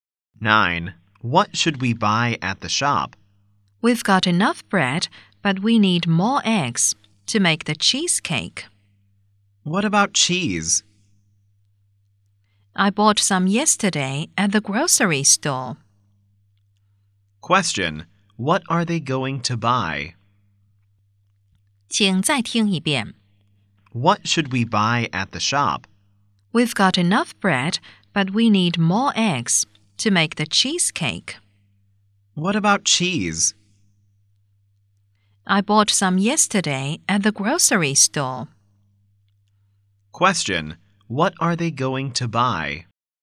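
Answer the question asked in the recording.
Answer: Eggs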